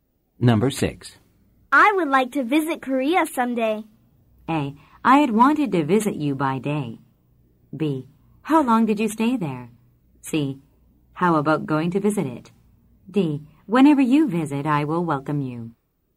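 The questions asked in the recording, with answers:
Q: I would like to visit Korea someday.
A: D: Whenever you visit, I will welcome you.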